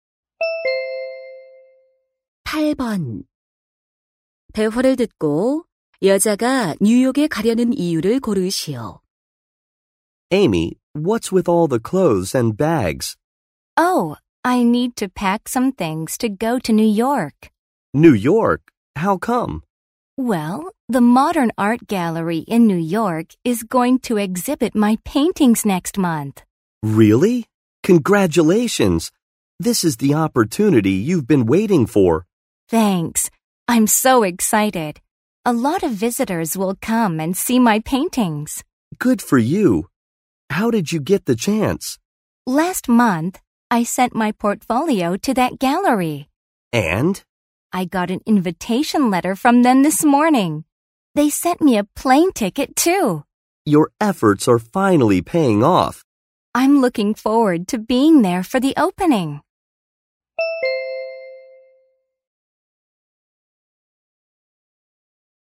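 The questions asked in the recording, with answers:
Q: 대화를 듣고 여자가 뉴욕에 가려는 이유를 고르시오.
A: 자신의 그림 전시회에 참석하려고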